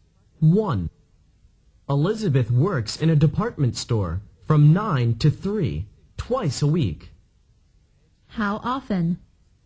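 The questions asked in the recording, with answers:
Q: How often?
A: Twice a week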